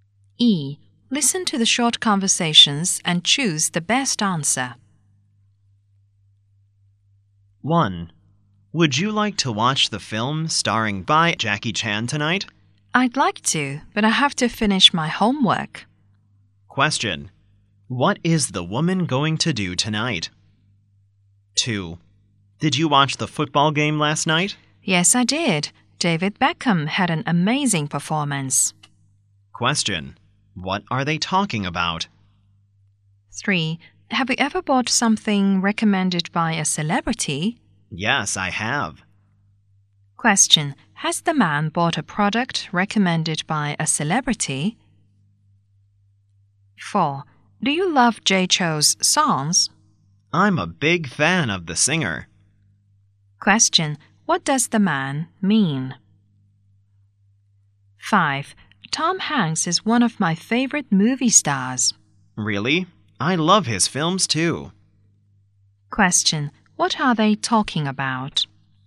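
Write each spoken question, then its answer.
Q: What is the woman going to do tonight?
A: Finish her homework

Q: What are they talking about?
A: Last night's football game and David Beckham's performance

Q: What does the man mean?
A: He loves Jay Chou's songs; he's a big fan

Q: What are they talking about?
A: Tom Hanks, a movie star, and his films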